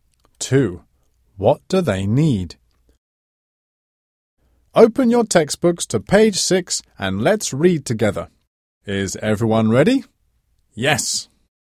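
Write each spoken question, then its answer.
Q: What do they need?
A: Textbooks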